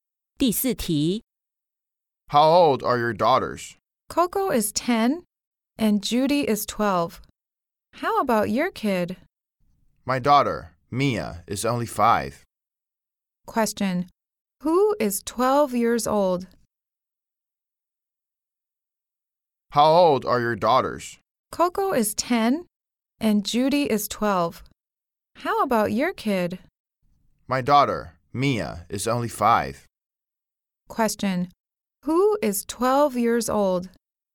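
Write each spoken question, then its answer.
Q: Who is 12 years old?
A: Judy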